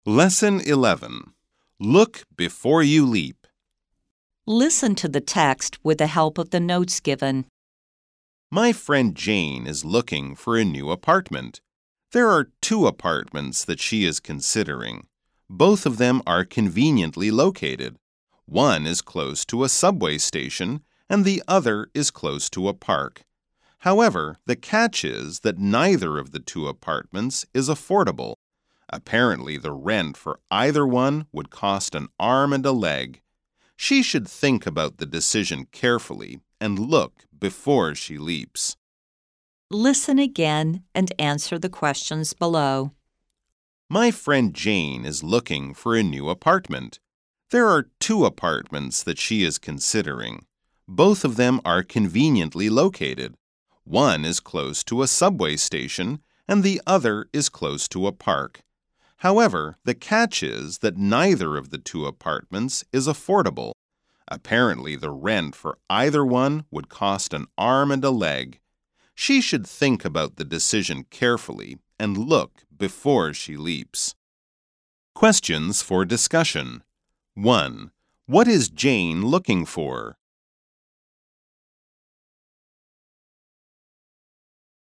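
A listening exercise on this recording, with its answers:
Listen again and answer the questions below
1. What is Jane looking for?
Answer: A new apartment.

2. What are the apartments close to?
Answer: One is close to a subway station, the other to a park.

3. What is the problem with both apartments?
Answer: Neither is affordable; the rent is too expensive.

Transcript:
My friend, Jane, is looking for a new apartment. There are two apartments that she is considering. Both of them are conveniently located; one is close to a subway station, and the other is close to a park. However, the catch is that neither of the two apartments is affordable. Apparently, the rent for either one would cost an arm and a leg. She should think about the decision carefully and look before she leaps.

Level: 中階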